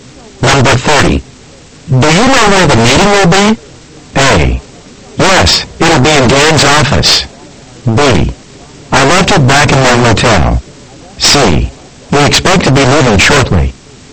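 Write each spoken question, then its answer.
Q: Do you know where the meeting will be?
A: A: Yes, it'll be in Dan's office.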